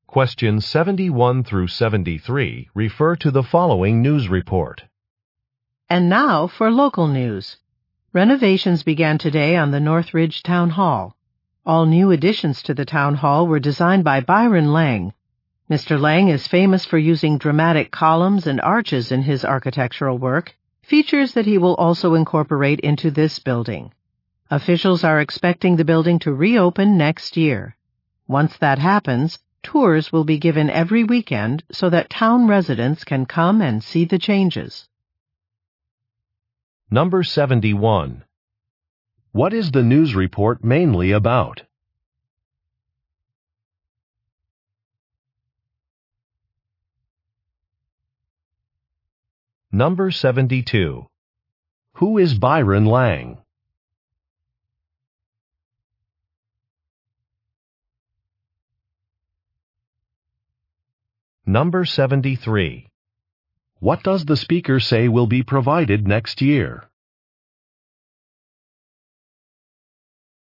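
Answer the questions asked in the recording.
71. Renovations of the Northridge Town Hall
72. An architect
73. Weekend tours of the town hall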